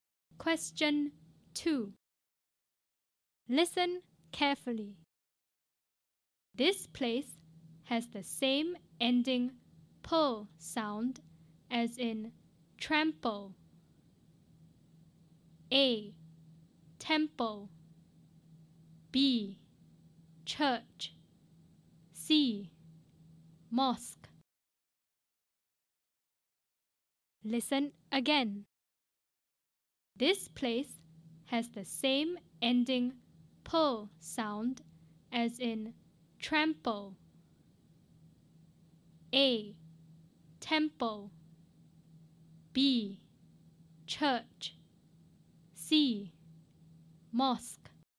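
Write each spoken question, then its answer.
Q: This place has the same ending "pull" sound as in trample.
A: A: Temple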